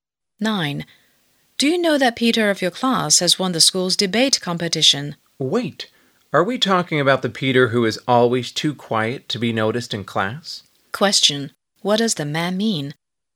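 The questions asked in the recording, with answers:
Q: What does the man mean?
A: He is surprised that quiet Peter won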